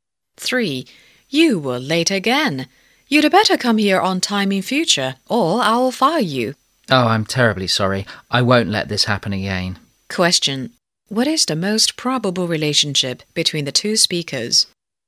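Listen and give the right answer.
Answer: Boss and employee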